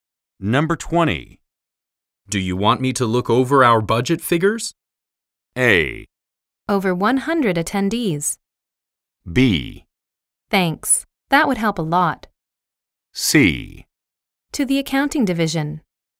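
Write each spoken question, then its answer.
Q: Do you want me to look over our budget figures?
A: B: Thanks. That would help a lot.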